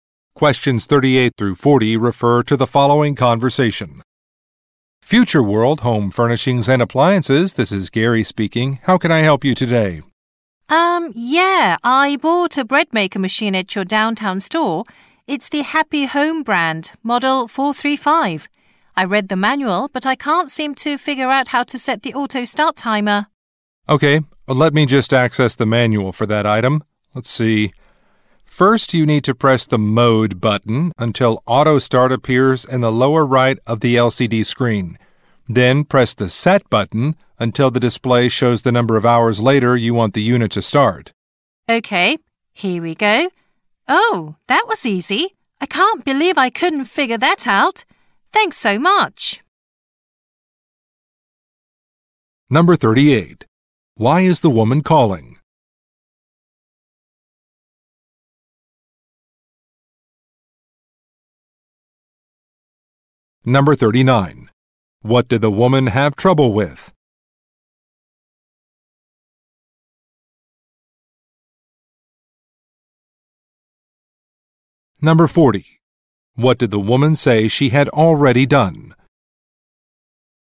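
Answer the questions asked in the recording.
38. To get help using a bread maker she bought
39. Setting the auto start timer
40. Read the manual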